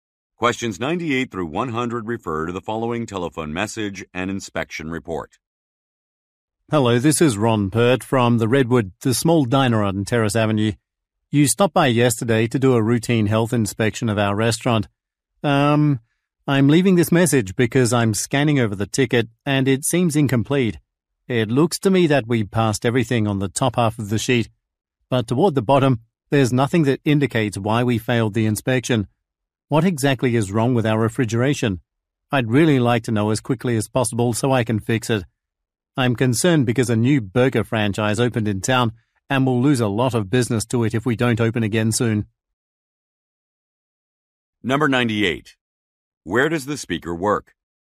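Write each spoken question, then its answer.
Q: Where does the speaker work?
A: At a diner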